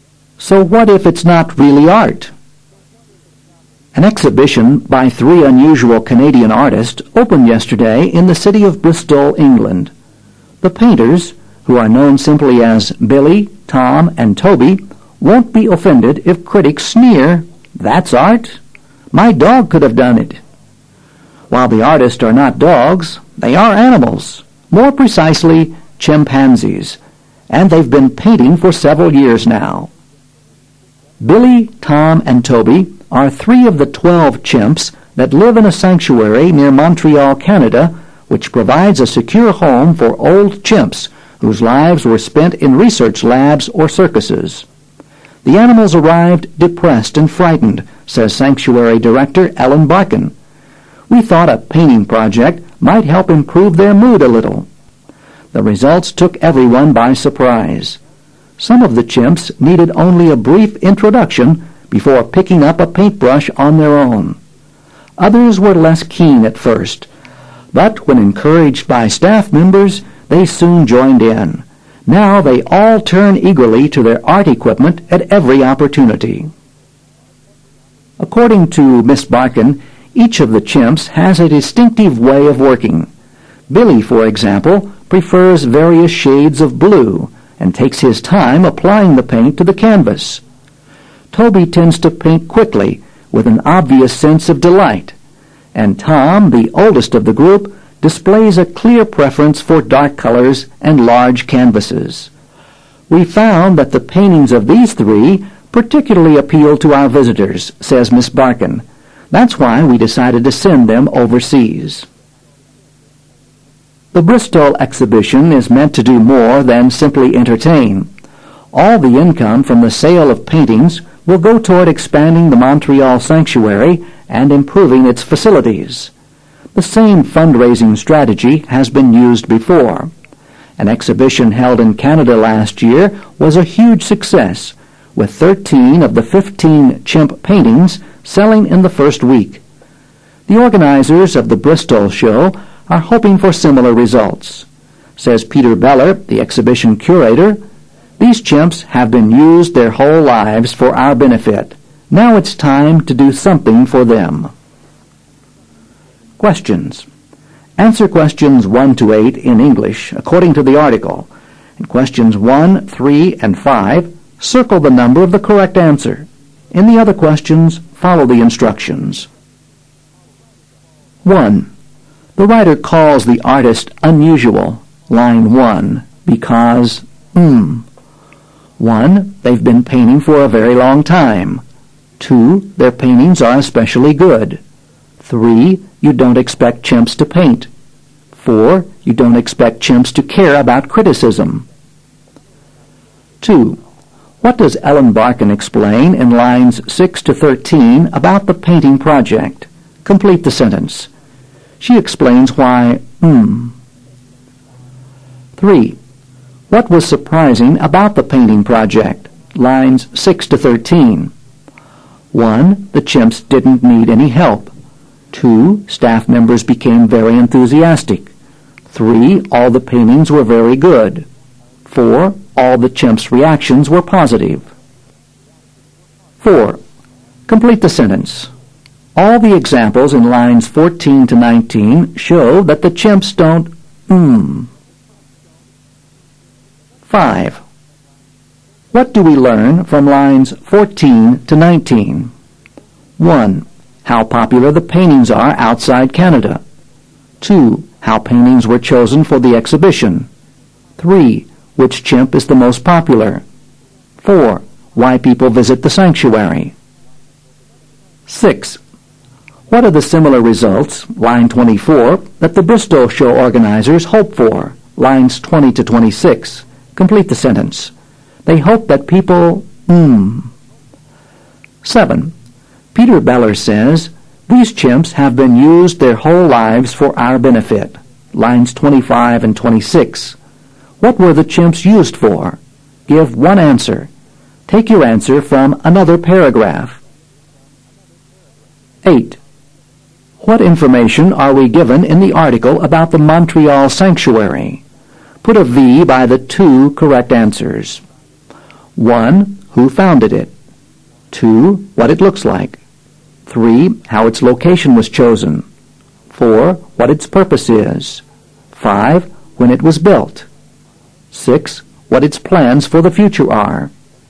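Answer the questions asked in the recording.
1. 3: You don't expect chimps to paint.
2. Why they started it: to improve the chimps' mood
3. 4: All the chimps' reactions were positive.
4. all paint the same way
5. 2: How paintings were chosen for the exhibition.
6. They hope that people will buy most of the paintings quickly
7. Research in labs (or circuses)
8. 4: What its purpose is; 6: What its plans for the future are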